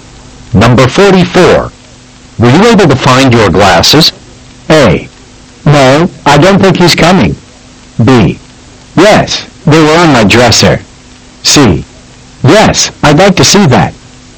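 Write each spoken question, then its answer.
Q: Were you able to find your glasses?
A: B: Yes, they were on my dresser.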